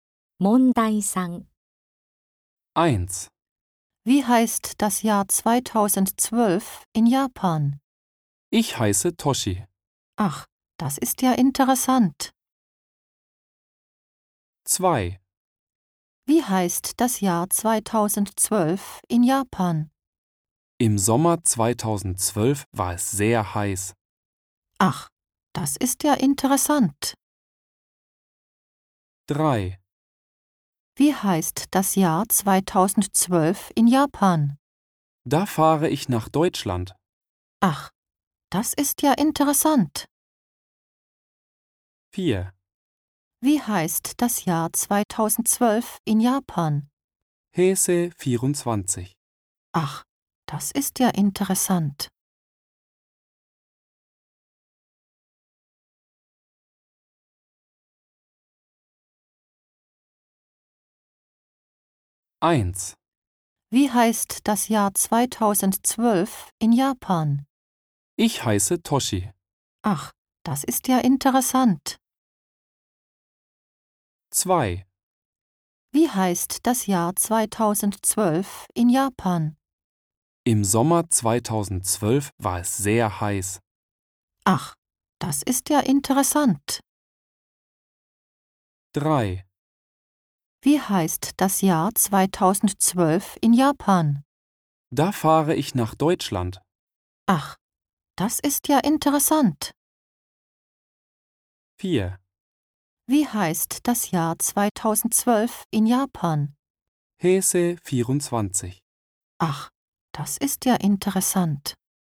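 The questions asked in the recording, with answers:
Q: Wie heißt das Jahr 2012 in Japan?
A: 4: Heisei 24.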